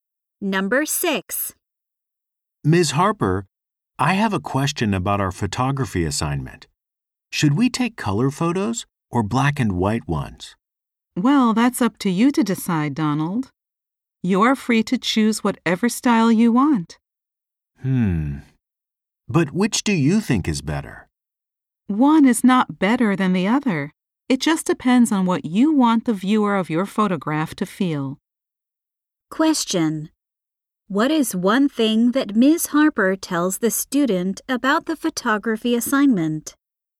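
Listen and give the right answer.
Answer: The students can choose color or black and white freely.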